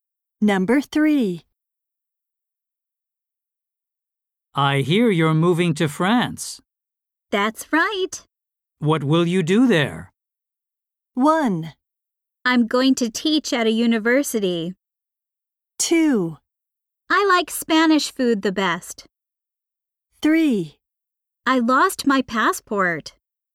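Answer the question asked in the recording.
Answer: 1: I'm going to teach at a university.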